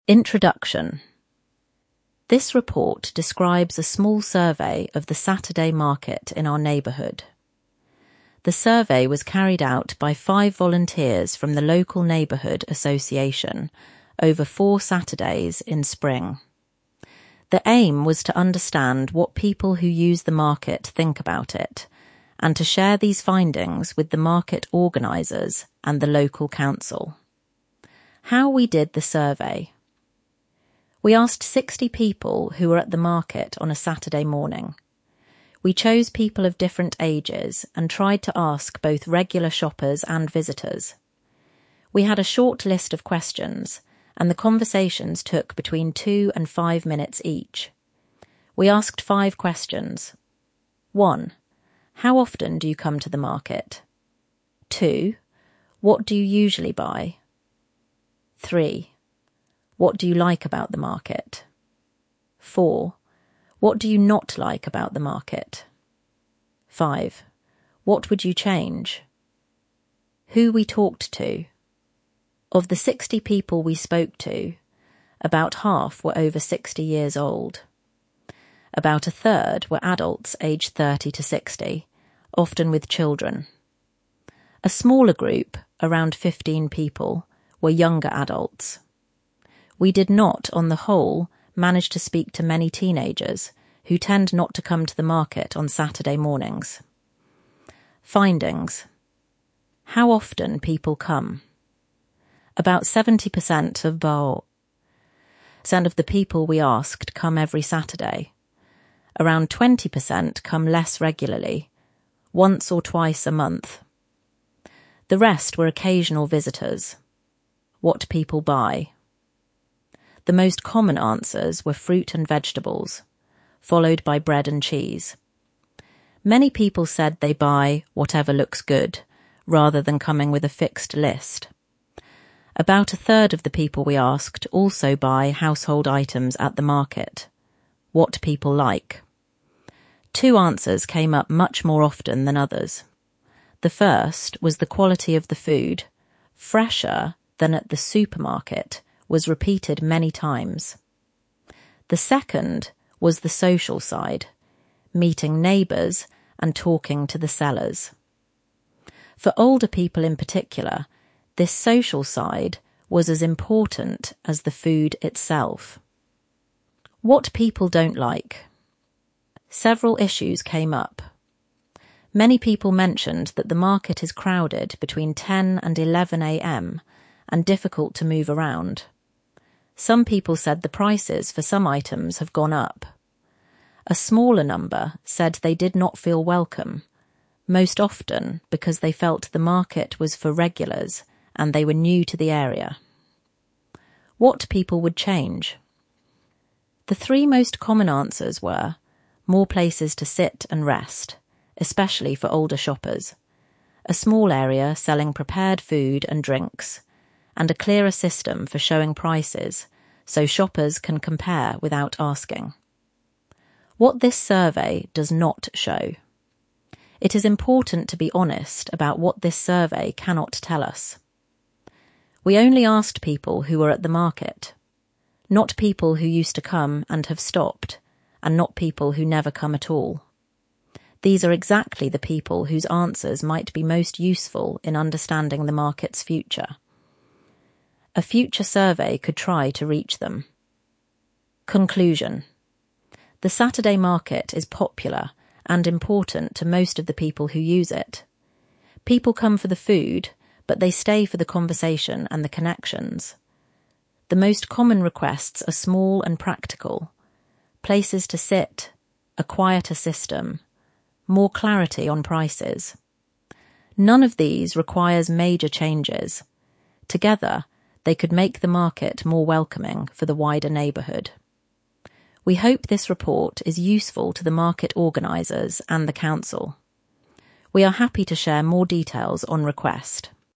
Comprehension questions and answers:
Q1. How many people did the volunteers speak to, and what kind of people?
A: 60 people. Of different ages, both regular shoppers and visitors.

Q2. Who did the volunteers NOT manage to speak to?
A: Many teenagers — who tend not to come to the market on Saturday mornings.

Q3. How often do most people come to the market?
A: About 70% come every Saturday. Around 20% come once or twice a month. The rest are occasional visitors.

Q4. What two answers about 'what people like' came up much more often than others?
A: (1) The quality of the food — 'fresher than at the supermarket'. (2) The social side — meeting neighbours and talking to sellers.

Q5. What did some new people say about the market?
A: They didn't feel welcome — most often because they felt the market was 'for regulars' and they were new to the area.

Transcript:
INTRODUCTION
This report describes a small survey of the Saturday market in our neighbourhood. The survey was carried out by five volunteers from the local neighbourhood association, over four Saturdays in spring. The aim was to understand what people who use the market think about it, and to share these findings with the market organisers and the local council.
HOW WE DID THE SURVEY
We asked 60 people who were at the market on a Saturday morning. We chose people of different ages and tried to ask both regular shoppers and visitors. We had a short list of questions, and the conversations took between two and five minutes each.
We asked five questions:
1. How often do you come to the market?
2. What do you usually buy?
3. What do you like about the market?
4. What do you not like about the market?
5. What would you change?
WHO WE TALKED TO
Of the 60 people we spoke to, about half were over 60 years old. About a third were adults aged 30 to 60, often with children. A smaller group (around 15 people) were younger adults. We did not, on the whole, manage to speak to many teenagers, who tend not to come to the market on Saturday mornings.
FINDINGS
How often people come. About 70% of the people we asked come every Saturday. Around 20% come less regularly — once or twice a month. The rest were occasional visitors.
What people buy. The most common answers were fruit and vegetables, followed by bread and cheese. Many people said they buy 'whatever looks good' rather than coming with a fixed list. About a third of the people we asked also buy household items at the market.
What people like. Two answers came up much more often than others. The first was the quality of the food — 'fresher than at the supermarket' was repeated many times. The second was the social side — meeting neighbours and talking to the sellers. For older people in particular, this social side was as important as the food itself.
What people don't like. Several issues came up. Many people mentioned that the market is crowded between 10 and 11 a.m. and difficult to move around. Some people said the prices for some items have gone up. A smaller number said they did not feel welcome — most often because they felt the market was 'for regulars' and they were new to the area.
What people would change. The three most common answers were: more places to sit and rest (especially for older shoppers); a small area selling prepared food and drinks; and a clearer system for showing prices, so shoppers can compare without asking.
WHAT THIS SURVEY DOES NOT SHOW
It is important to be honest about what this survey cannot tell us. We only asked people who were at the market — not people who used to come and have stopped, and not people who never come at all. These are exactly the people whose answers might be most useful in understanding the market's future. A future survey could try to reach them.
CONCLUSION
The Saturday market is popular and important to most of the people who use it. People come for the food, but they stay for the conversation and the connections. The most common requests are small and practical — places to sit, a quieter system, more clarity on prices. None of these requires major changes; together, they could make the market more welcoming for the wider neighbourhood.
We hope this report is useful to the market organisers and the council.
"We are happy to share more details on request."
Questions
Show all answers
Who carried out the survey, and over what period?